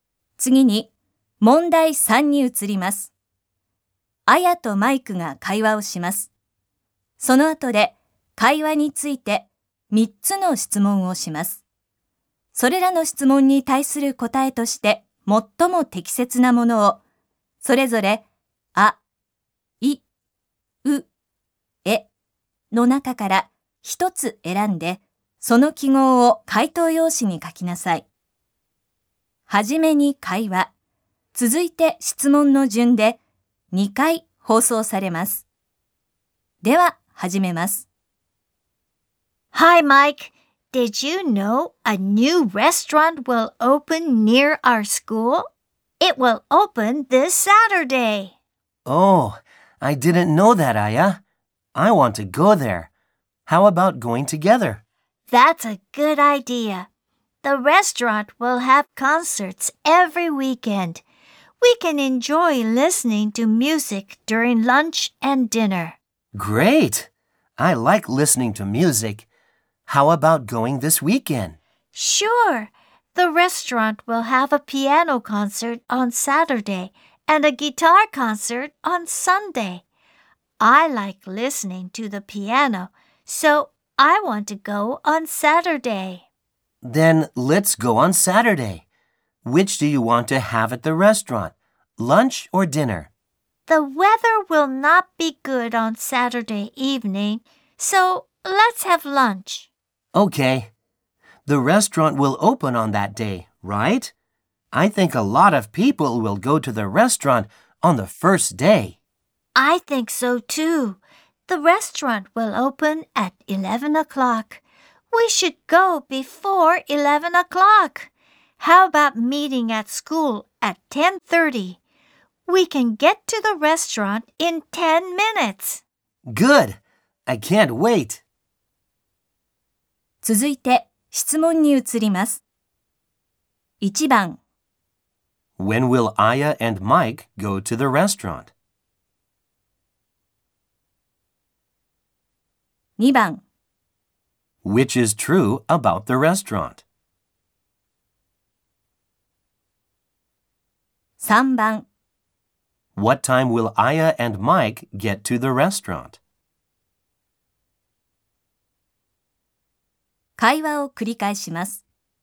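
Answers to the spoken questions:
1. This Saturday, for lunch
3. At 10:40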